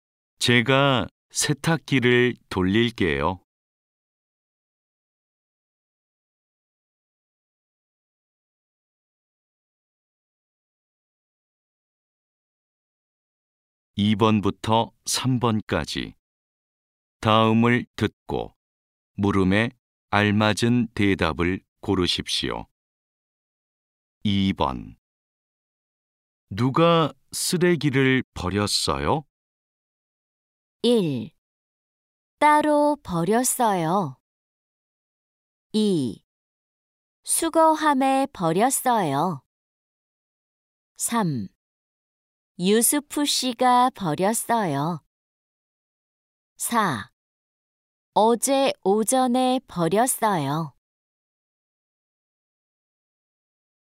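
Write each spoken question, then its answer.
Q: 누가 쓰레기를 버렸어요?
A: 3: 유스프 씨가 버렸어요.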